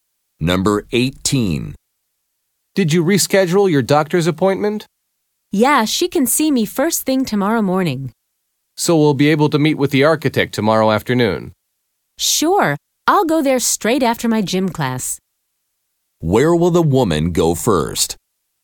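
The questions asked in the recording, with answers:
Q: Where will the woman go first?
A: To the doctor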